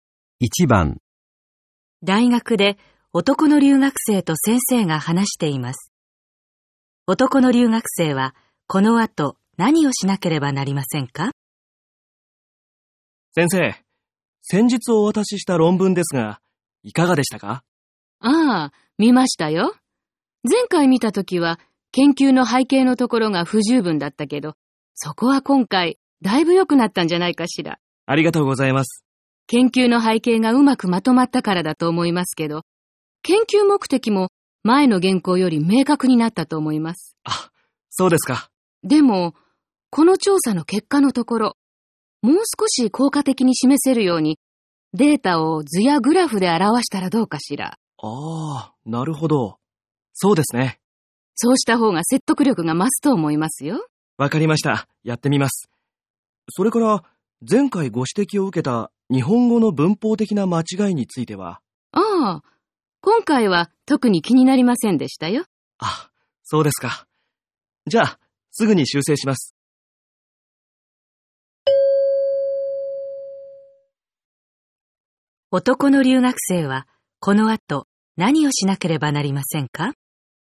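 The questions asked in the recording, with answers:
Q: 男の留学生はこの後何をしなければなりませんか?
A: 調査結果のデータを図やグラフで表す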